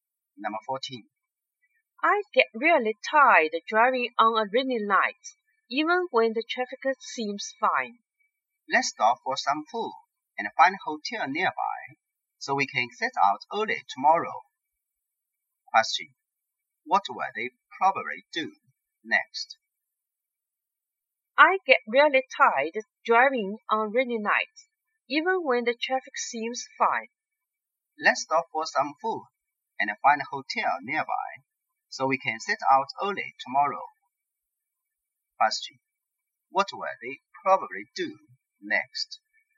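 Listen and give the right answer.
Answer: Stop for food and find a hotel nearby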